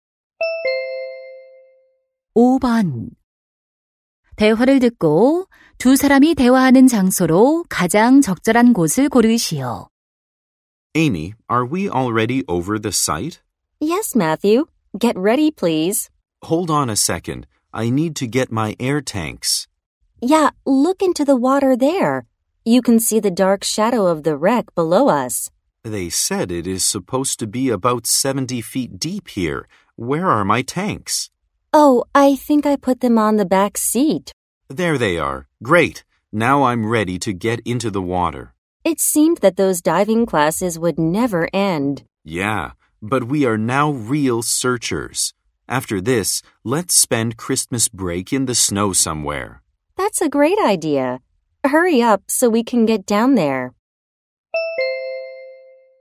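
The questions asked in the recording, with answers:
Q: 대화를 듣고 두 사람이 대화하는 장소로 가장 적절한 곳을 고르시오.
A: 보트 위 (난파선 잠수 지점)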